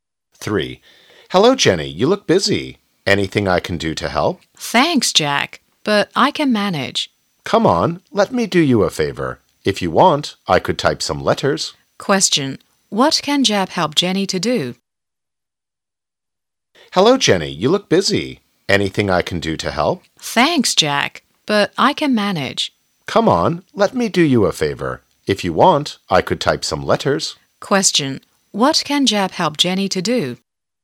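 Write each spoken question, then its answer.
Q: What can Jack help Jenny to do?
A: Type some letters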